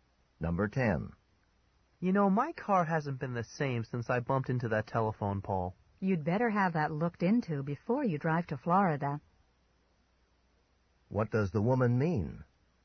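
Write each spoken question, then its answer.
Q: What does the woman mean?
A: The man should have his car checked before driving to Florida.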